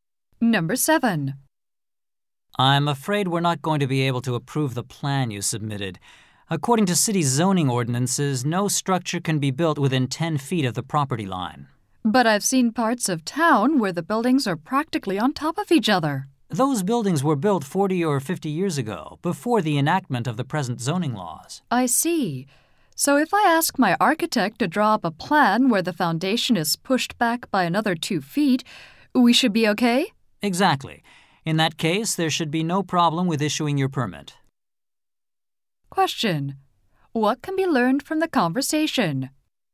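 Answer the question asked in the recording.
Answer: The plan breaks zoning rules but can be approved if the building is moved back 2 feet.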